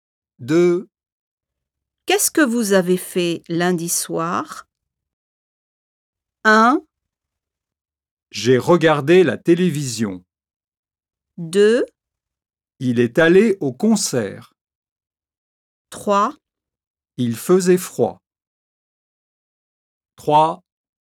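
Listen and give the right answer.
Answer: 1: J'ai regardé la télévision.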